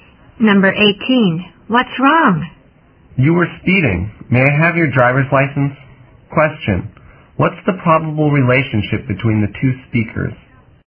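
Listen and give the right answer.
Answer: Driver and police officer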